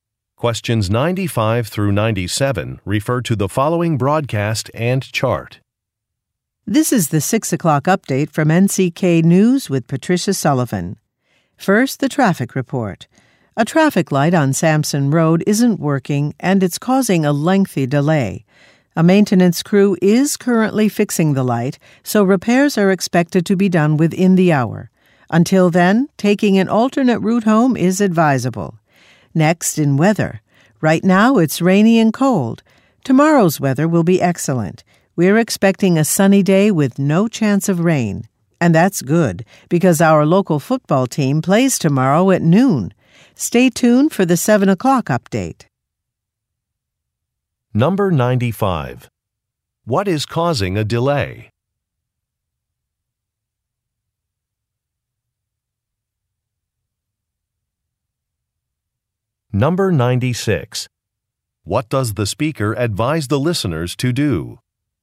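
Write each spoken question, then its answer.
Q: What is causing a delay?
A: A traffic light on Sampson Road isn't working

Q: What does the speaker advise the listeners to do?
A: Take an alternate route home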